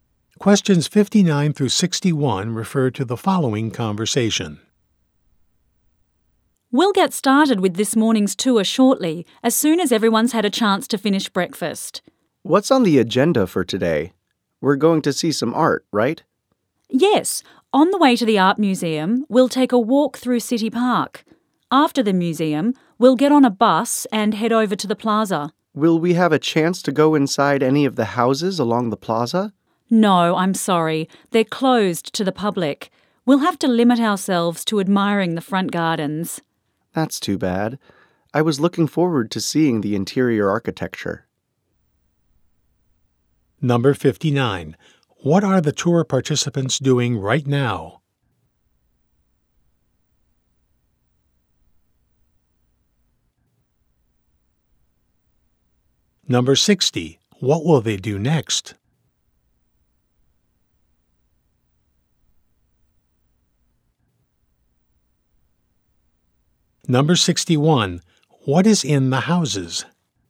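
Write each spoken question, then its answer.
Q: What are the tour participants doing right now?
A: Eating breakfast

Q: What will they do next?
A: Walk through City Park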